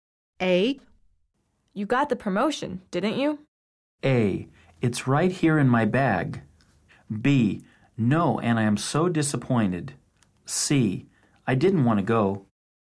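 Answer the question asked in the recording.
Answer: B: No, and I am so disappointed.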